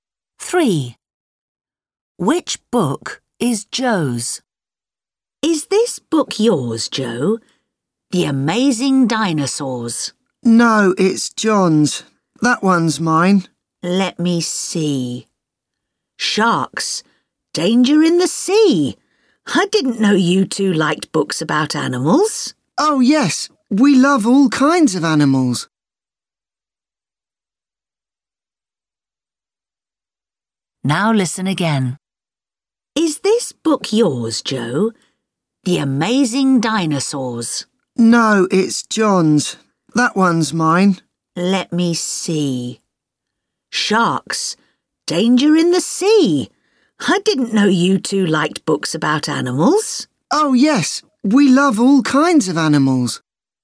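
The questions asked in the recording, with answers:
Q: Which book is Joe's?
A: Sharks. Danger in the Sea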